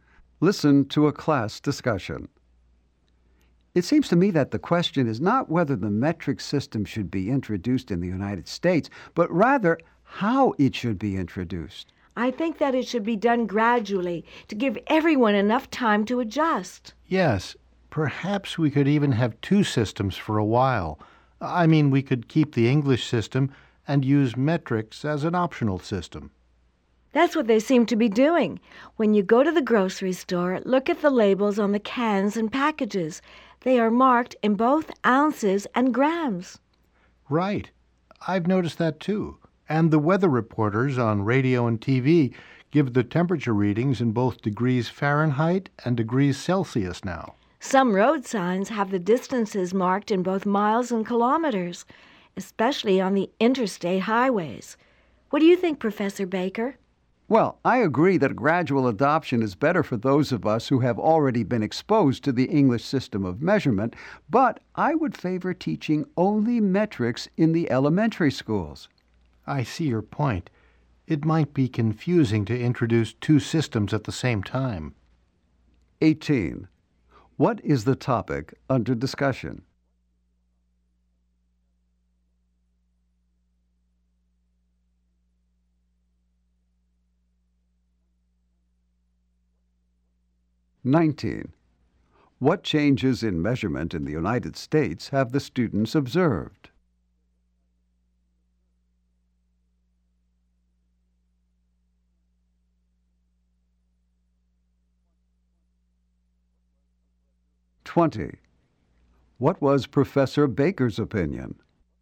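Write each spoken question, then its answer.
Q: What is the topic under discussion?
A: How the metric system should be introduced in the United States

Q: What changes in measurement in the United States have the students observed?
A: Labels, temperatures and road signs show both English and metric units

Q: What was Professor Baker's opinion?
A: Only metrics should be taught in elementary schools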